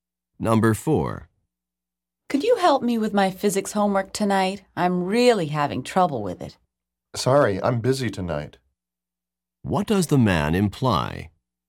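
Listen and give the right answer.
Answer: He can't help with the physics homework tonight.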